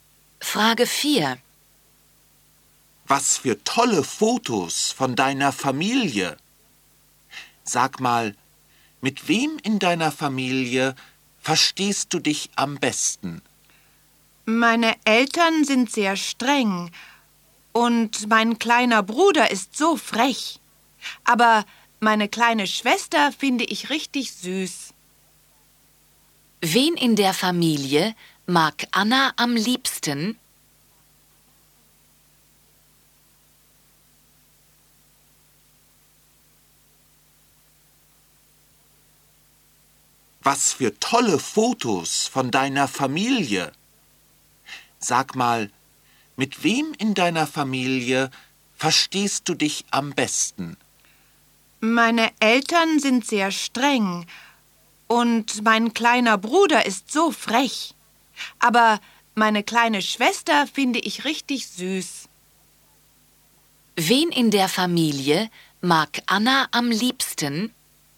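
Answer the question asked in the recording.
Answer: Ihre kleine Schwester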